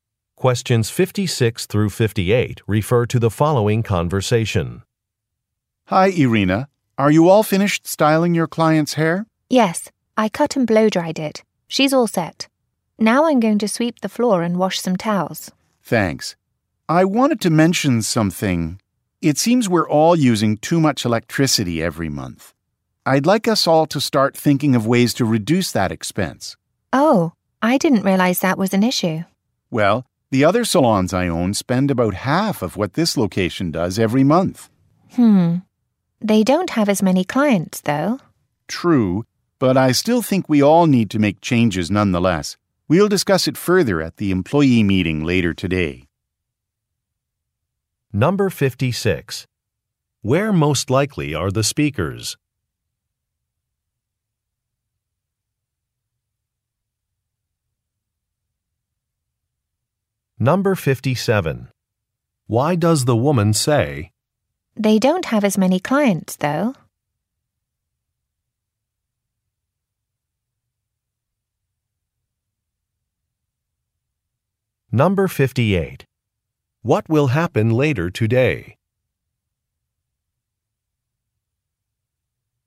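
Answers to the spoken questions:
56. At a hair salon
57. To explain why the other salons use less electricity
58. An employee meeting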